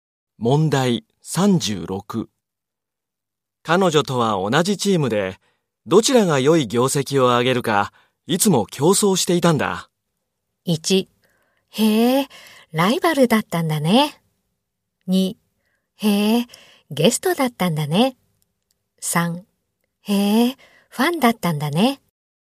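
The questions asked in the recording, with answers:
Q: 彼女とは同じチームで、どちらが良い業績を上げるか、いつも競争していたんだ。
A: 1: へえ、ライバルだったんだね。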